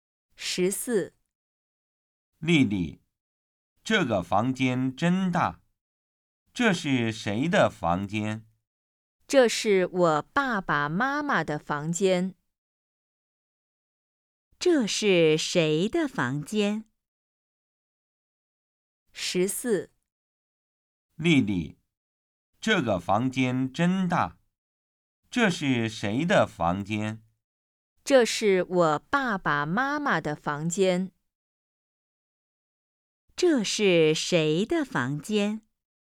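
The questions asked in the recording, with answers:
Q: 这是谁的房间?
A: 丽丽爸爸妈妈的房间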